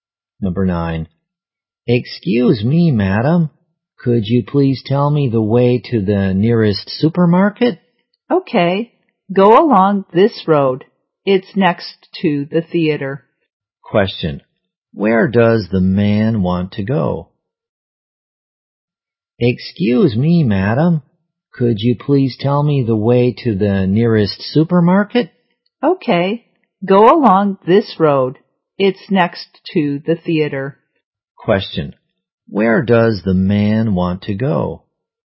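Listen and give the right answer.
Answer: The nearest supermarket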